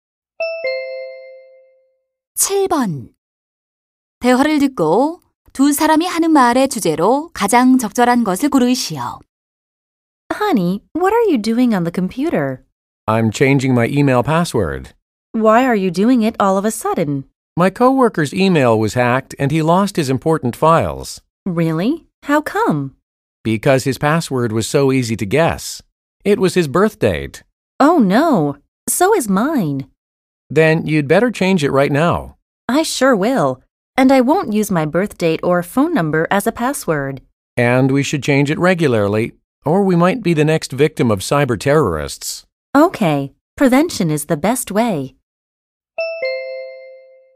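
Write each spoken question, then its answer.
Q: 대화를 듣고 두 사람이 하는 말의 주제로 가장 적절한 것을 고르시오.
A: 해킹 예방을 위한 비밀번호 관리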